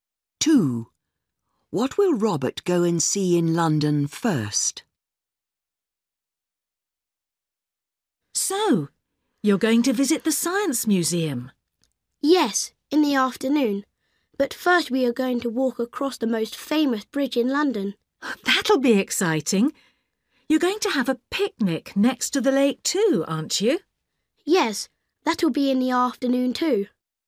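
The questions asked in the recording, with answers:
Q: What will Robert go and see in London first?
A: The most famous bridge in London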